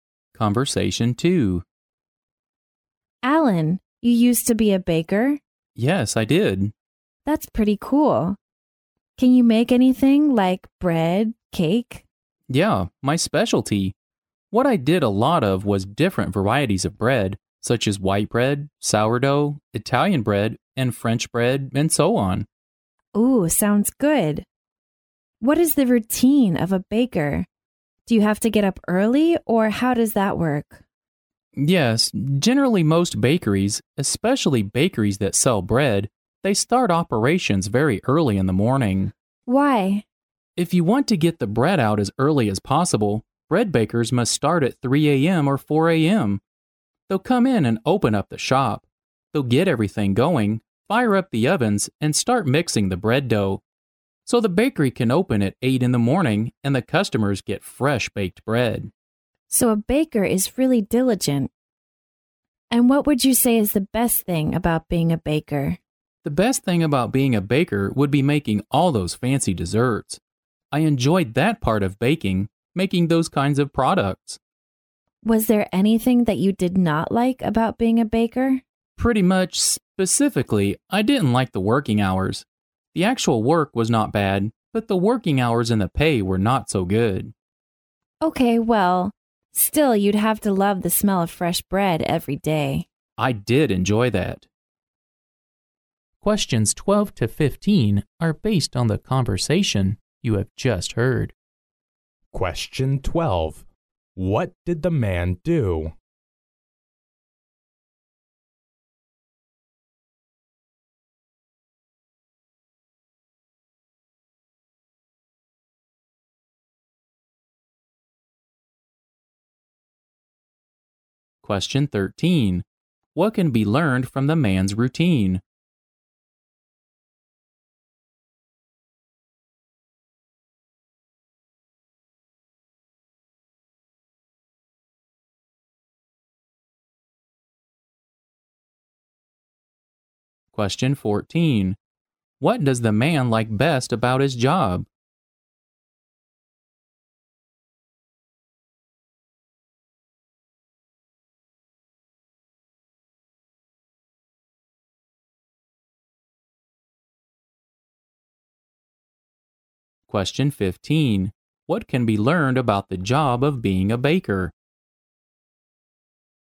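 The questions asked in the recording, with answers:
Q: What did the man do?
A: He was a baker.

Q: What can be learned from the man's routine?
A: He had to start work very early, at 3 or 4 a.m.

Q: What does the man like best about his job?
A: Making fancy desserts.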